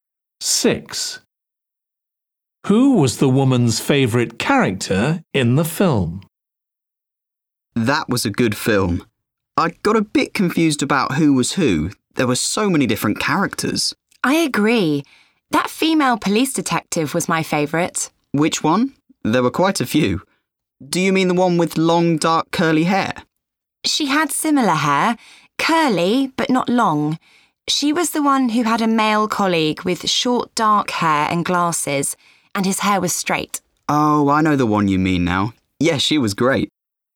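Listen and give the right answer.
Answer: the female police detective with short, dark, curly hair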